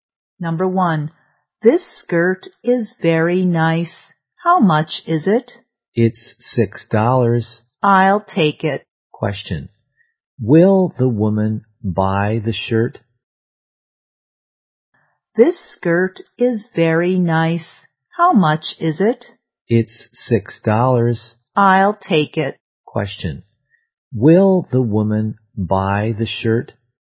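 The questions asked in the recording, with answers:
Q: Question, will the woman buy the shirt?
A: Yes, she will.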